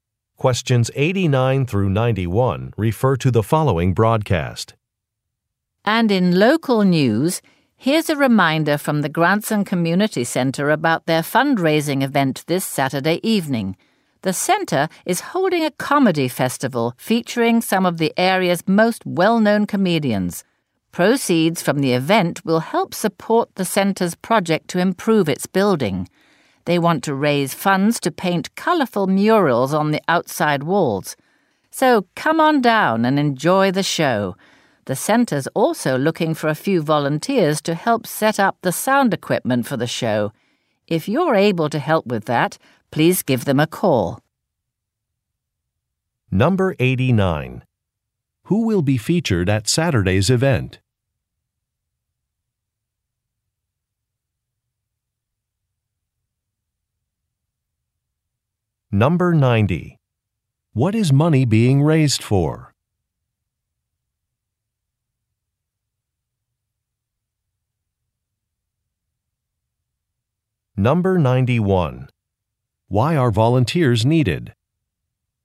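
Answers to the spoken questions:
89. Local comedians
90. Painting murals on the center's outside walls
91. To set up sound equipment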